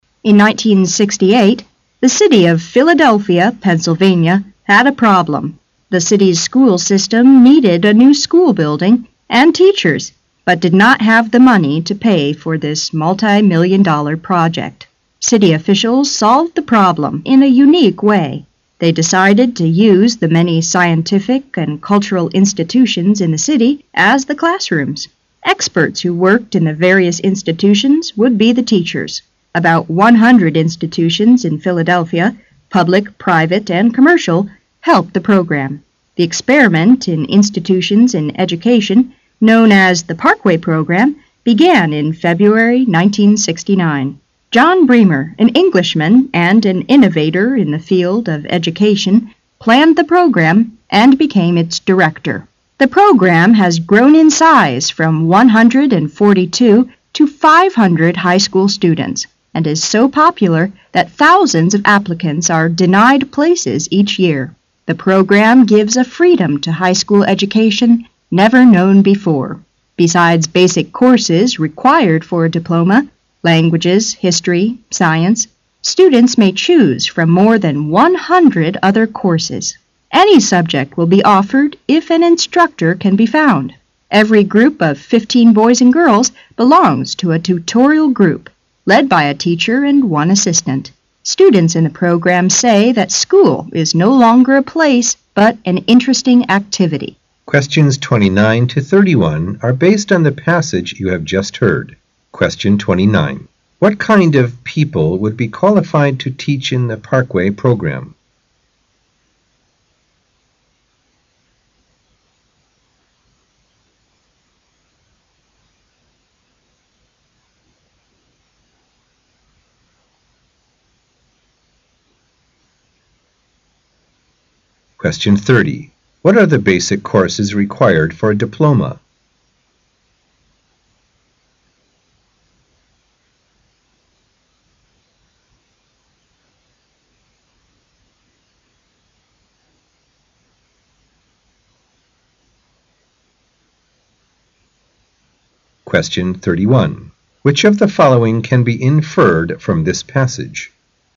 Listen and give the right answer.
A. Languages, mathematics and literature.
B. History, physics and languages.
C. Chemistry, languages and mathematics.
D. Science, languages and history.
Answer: D. Science, languages and history.

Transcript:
[解析] 29-31 In 1968, the city of Philadelphia, Pennsylvania, had a problem. The city' s school system needed a new school building and teachers but did not have the money to pay for this multi million-dollar project. City officials solved the problem in a unique way. They decided m use the many scientific and cultural institutions in the city as the classrooms. Experts who worked in the various institutions would be the teachers. About 100 institutions in Philadelphia -- public, private, and commercial -- helped the program. The experiment in institutions in education, known as the Parkway Program, began in February 1969. John Bremer, an Englishman and an innovator in the field of education, planned the program and became its director. The Program has grown in size from 142 to 500 high school students and is so popular that thousands of applicants are denied places each year. The program gives a freedom to high school education never known before. Besides basic courses required for a diploma -- languages, history, science -- students may choose from more than one hundred other courses. Any subject will be offered if an instructor can be found. Every group of 15 boys and girls belongs to a "tutorial group", led by a teacher and one assistant. Students in the Program say that school is no longer a place but an interesting activity. What kind of people would be qualified to teach in the Parkway Program?